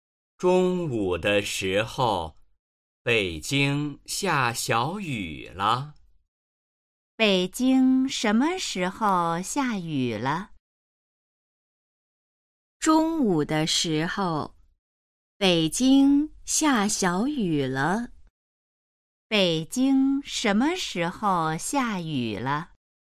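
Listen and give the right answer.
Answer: 中午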